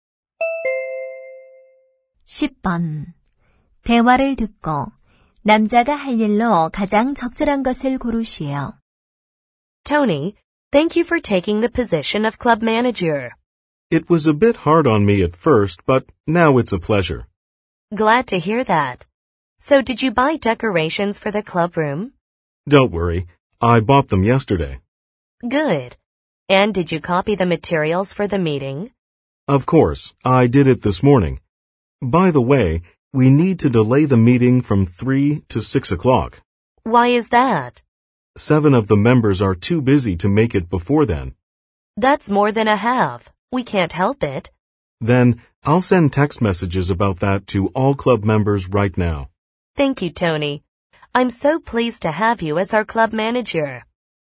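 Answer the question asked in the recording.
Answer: 회원들에게 회의 시간 변경 문자 보내기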